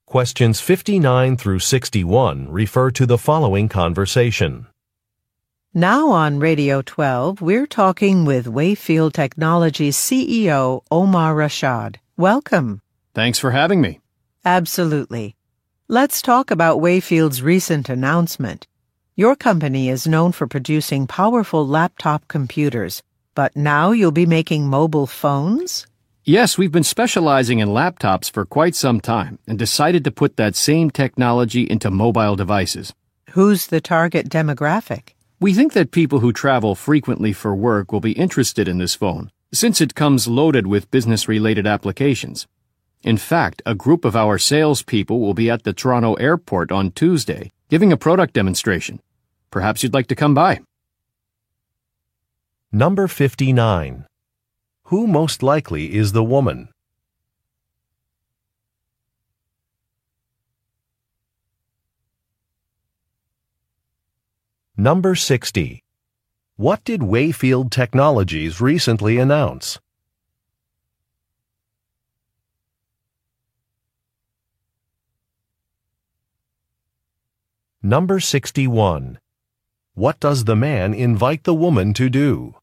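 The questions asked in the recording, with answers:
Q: Who most likely is the woman?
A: A radio show host

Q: What did Wayfield Technologies recently announce?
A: It will start making mobile phones

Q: What does the man invite the woman to do?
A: Attend a product demonstration at the Toronto airport on Tuesday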